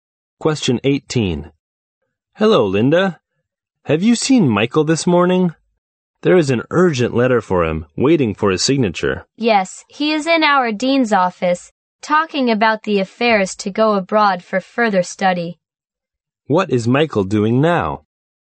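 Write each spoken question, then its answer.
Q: What is Michael doing now?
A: Talking in the dean's office about going abroad for further study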